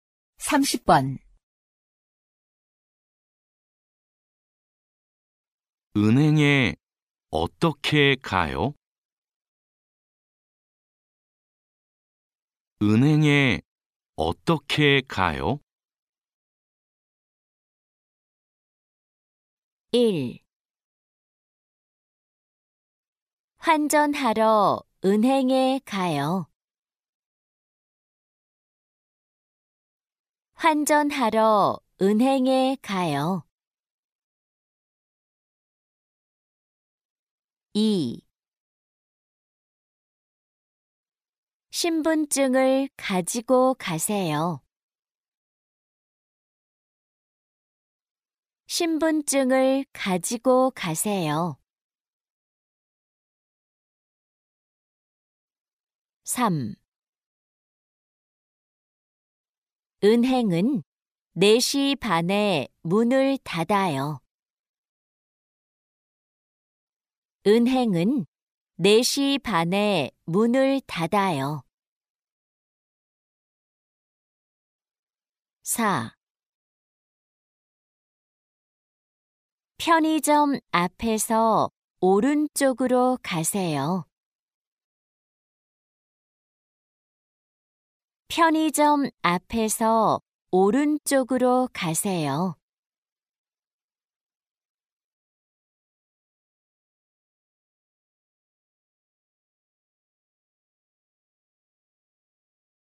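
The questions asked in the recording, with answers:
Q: 은행에 어떻게 가요?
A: 4: 편의점 앞에서 오른쪽으로 가세요.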